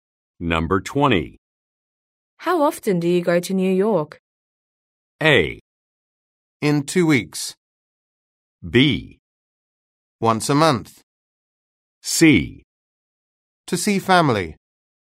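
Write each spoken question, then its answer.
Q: How often do you go to New York?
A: B: Once a month.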